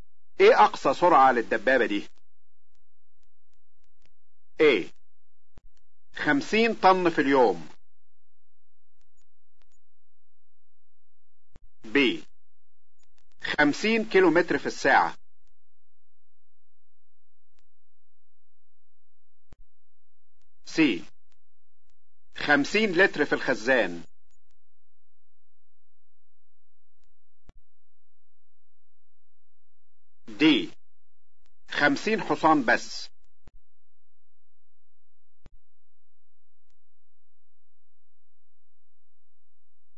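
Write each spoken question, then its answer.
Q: ايه اقصى سرعة للدبابة دي؟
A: B: 50 كيلومتر في الساعة.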